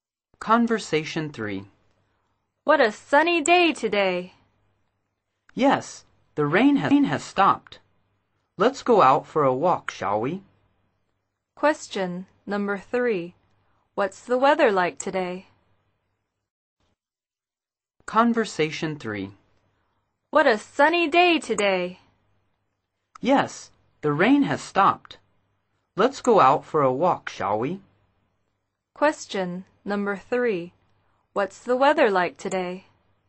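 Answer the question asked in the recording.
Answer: Sunny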